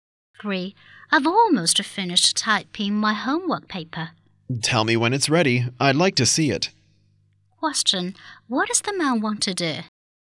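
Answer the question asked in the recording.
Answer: Read the woman's homework paper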